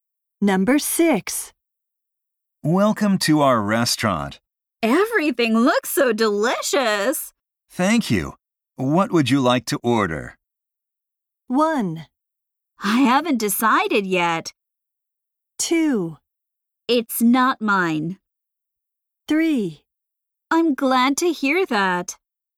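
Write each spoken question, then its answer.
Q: Thank you. What would you like to order?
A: 1: I haven't decided yet.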